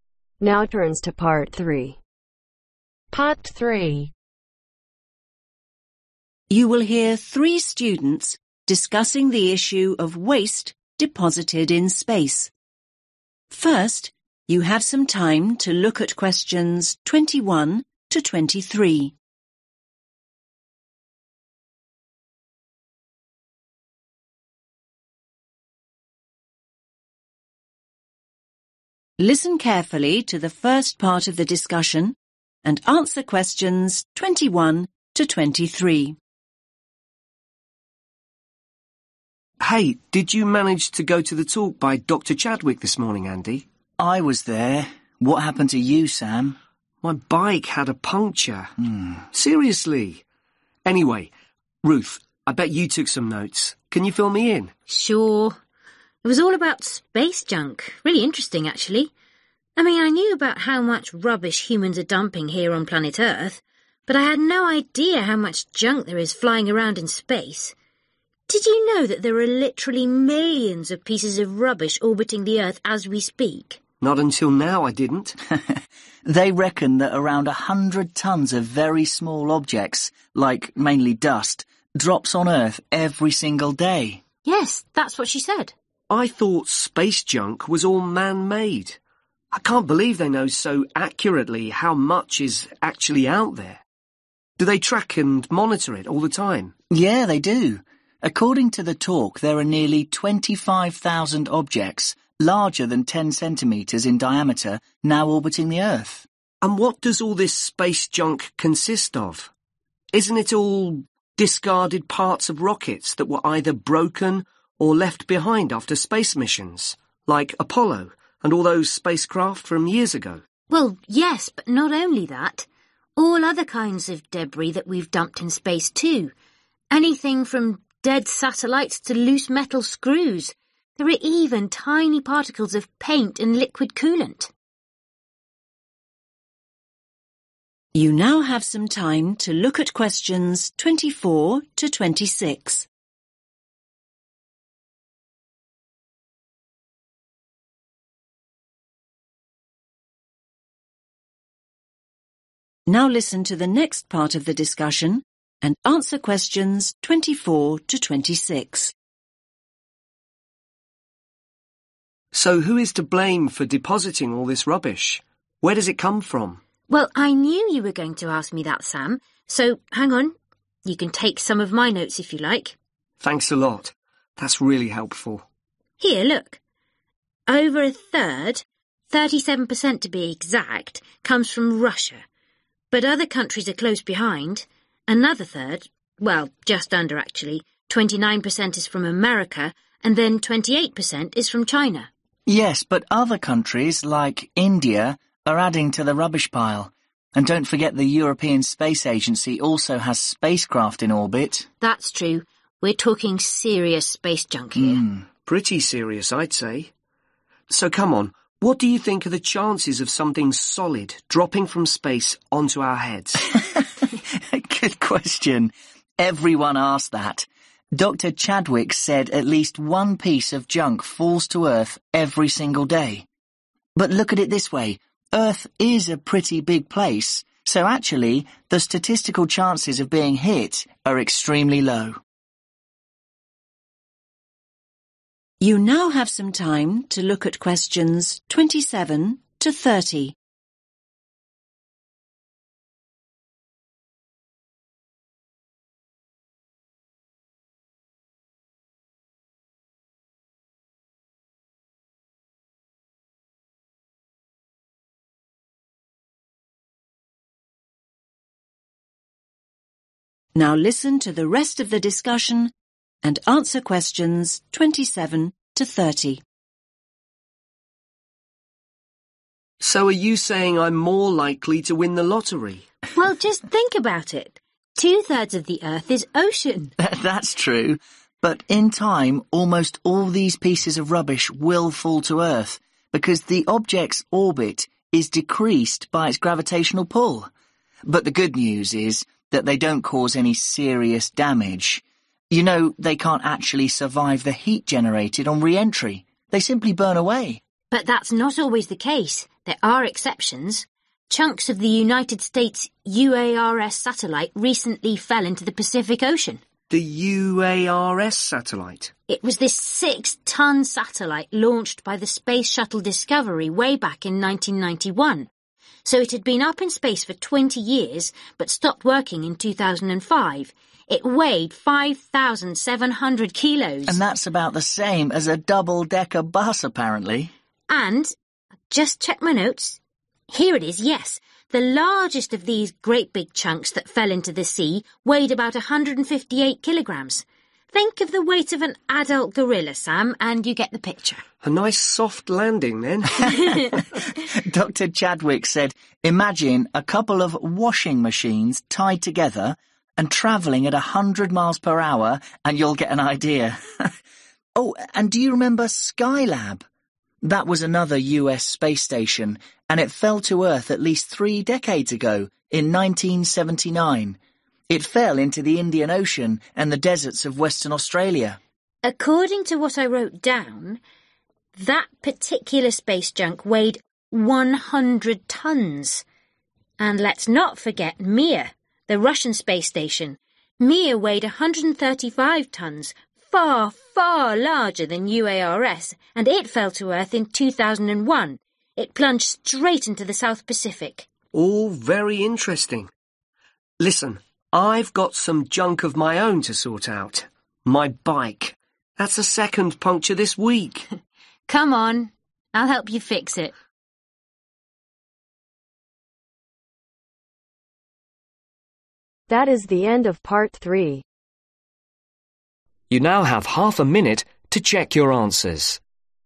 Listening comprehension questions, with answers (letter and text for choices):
Choose THREE letters A-G.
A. China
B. Europe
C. India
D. Russia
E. United States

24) 28% ............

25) 29% ............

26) 37% ............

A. a grown up gorilla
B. a double Decker bus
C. the desert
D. Eastern Australia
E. the 1980s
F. 2001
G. 100 tonnes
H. the south pacific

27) size and weight of (27) ............ was in space for two decades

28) ended up in (28) ............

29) weight of (29) ............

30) larger than UARS ended up in (30) ............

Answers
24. A. China
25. E. United States
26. D. Russia
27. B. a double Decker bus
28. C. the desert
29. G. 100 tonnes
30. H. the south pacific